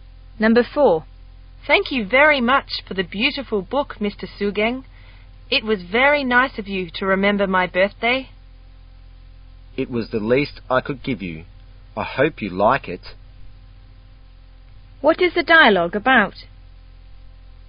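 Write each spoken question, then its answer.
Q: What is the dialogue about?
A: Thanking Mr. Sugeng for a birthday book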